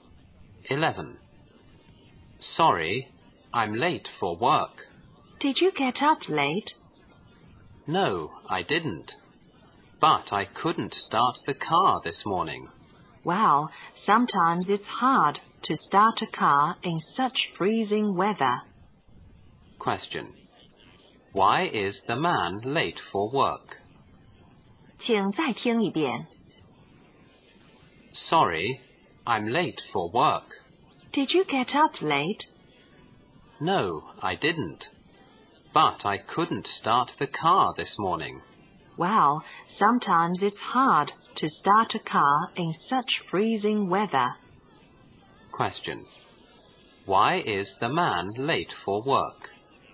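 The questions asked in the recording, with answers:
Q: Why is the man late for work?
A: He couldn't start the car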